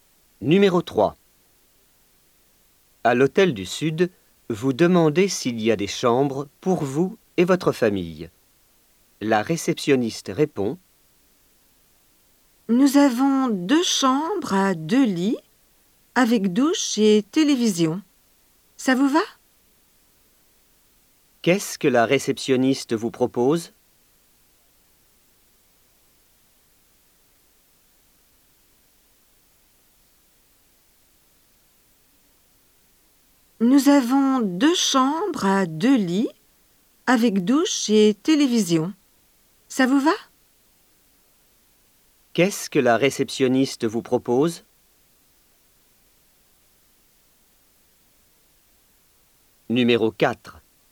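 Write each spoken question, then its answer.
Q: Qu'est-ce que la réceptionniste vous propose?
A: Deux chambres à deux lits, avec douche et télévision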